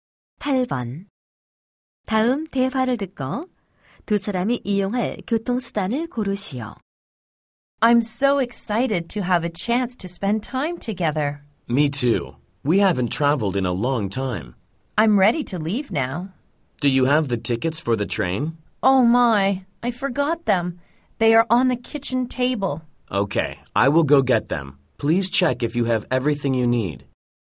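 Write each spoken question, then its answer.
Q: 다음 대화를 듣고 두 사람이 이용할 교통수단을 고르시오.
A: 기차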